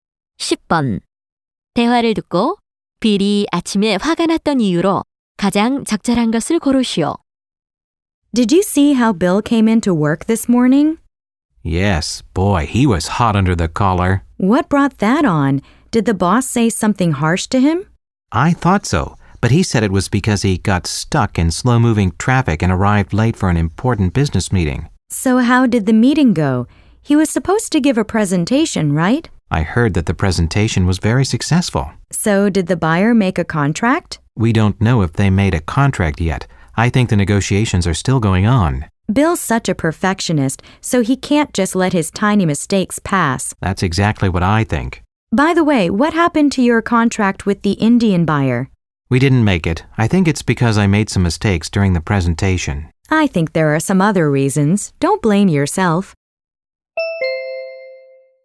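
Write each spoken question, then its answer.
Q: 대화를 듣고 빌이 아침에 화가 났던 이유로 가장 적절한 것을 고르시오.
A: 교통 체증으로 중요한 회의에 늦어서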